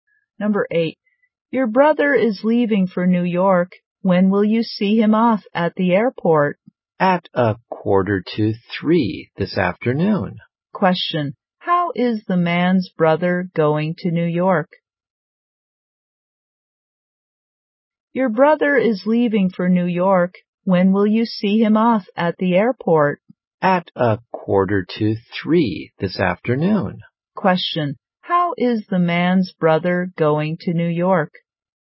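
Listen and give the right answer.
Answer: By plane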